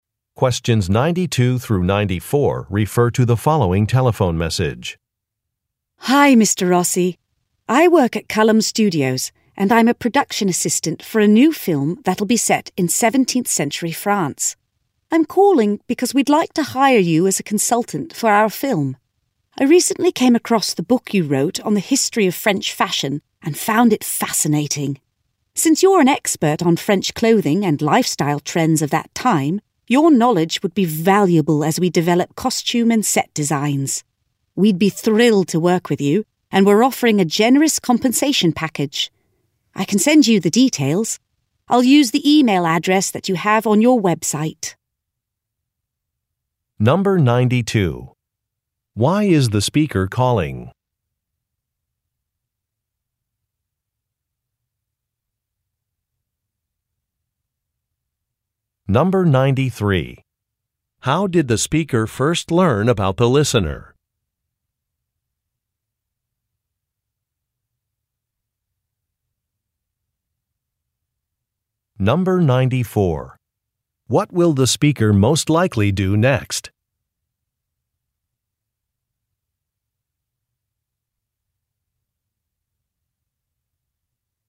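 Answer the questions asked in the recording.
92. To offer the listener a job as a film consultant
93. By reading a book the listener wrote
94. Email the listener the details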